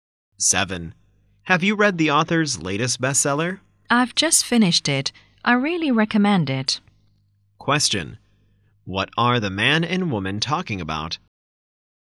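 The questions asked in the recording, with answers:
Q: What are the man and woman talking about?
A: A book.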